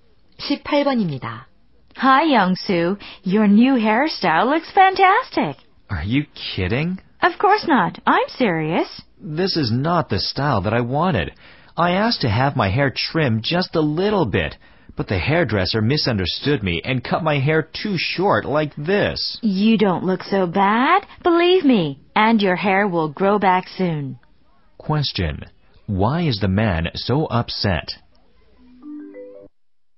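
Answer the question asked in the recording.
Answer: The hairdresser cut his hair too short.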